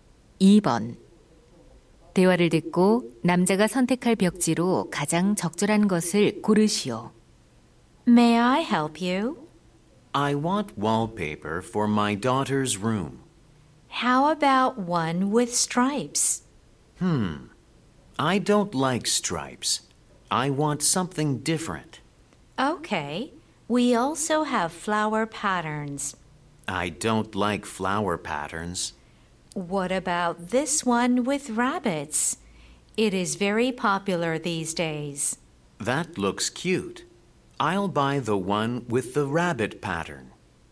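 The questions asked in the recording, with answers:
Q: 대화를 듣고 남자가 선택할 벽지로 가장 적절한 것을 고르시오.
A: 토끼 무늬 벽지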